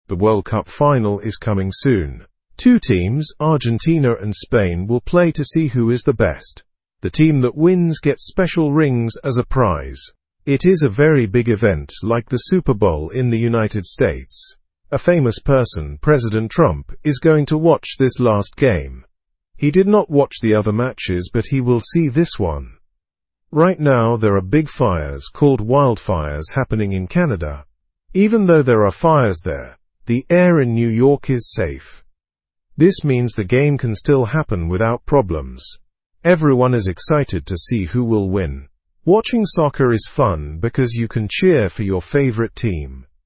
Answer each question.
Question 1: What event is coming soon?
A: The World Cup final.

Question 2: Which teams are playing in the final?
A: Argentina and Spain.

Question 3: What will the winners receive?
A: Special rings.

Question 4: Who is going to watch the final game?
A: President Trump.

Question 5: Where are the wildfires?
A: In Canada.

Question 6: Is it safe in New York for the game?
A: Yes, the air is okay in New York.

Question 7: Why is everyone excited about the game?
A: To see who will win.

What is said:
The World Cup final is coming soon. Two teams, Argentina and Spain, will play to see who is the best. The team that wins gets special rings as a prize. It is a very big event like the Super Bowl in the United States. A famous person, President Trump, is going to watch this last game. He did not watch the other matches, but he will see this one.
Right now, there are big fires, called wildfires, happening in Canada. Even though there are fires there, the air in New York is safe. This means the game can still happen without problems. Everyone is excited to see who will win. Watching soccer is fun because you can cheer for your favorite team.

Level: (Level 1)